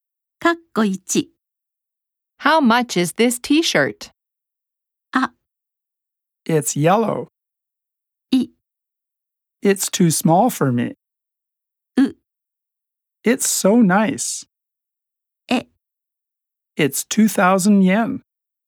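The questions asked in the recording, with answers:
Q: How much is this t-shirt?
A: え: It's 2,000 yen.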